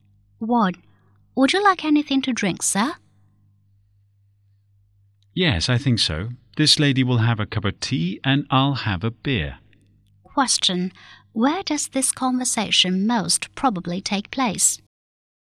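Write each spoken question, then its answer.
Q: Where does this conversation most probably take place?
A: In a restaurant or bar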